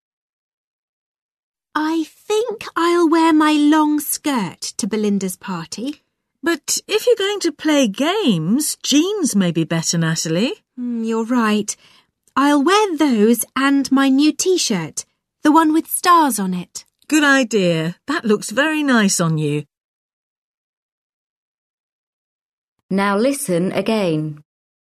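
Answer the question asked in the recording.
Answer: Jeans and her new T-shirt with stars on it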